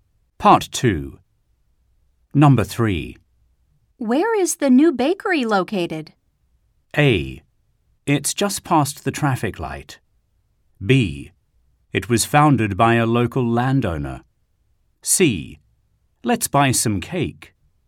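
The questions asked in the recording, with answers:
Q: Where is the new bakery located?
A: A: It's just past the traffic light.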